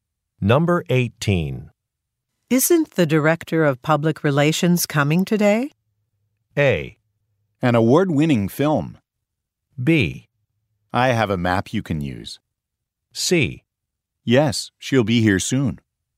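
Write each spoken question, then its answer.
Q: Isn't the director of public relations coming today?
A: C: Yes, she'll be here soon.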